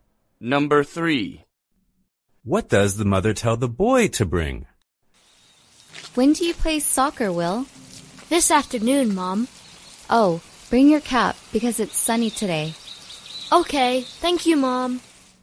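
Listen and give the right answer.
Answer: his cap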